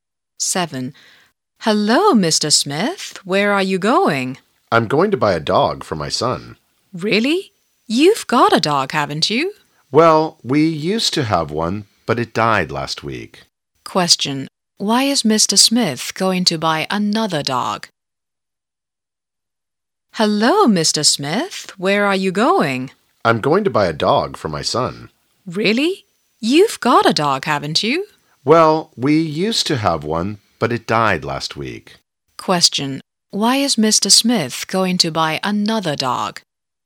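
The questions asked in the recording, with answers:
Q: Why is Mr. Smith going to buy another dog?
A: Because his old dog died last week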